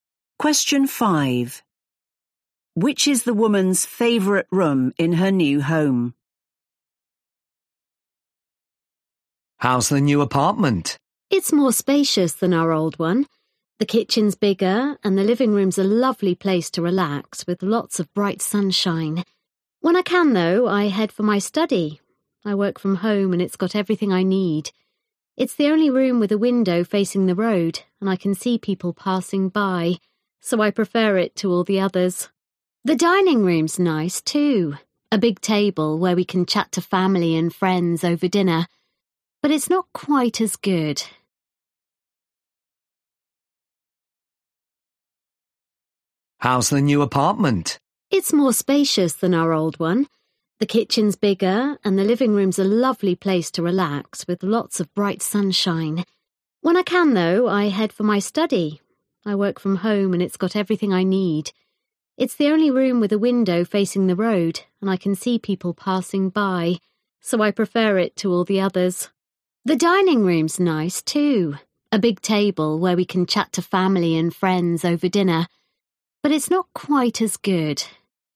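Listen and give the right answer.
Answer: her study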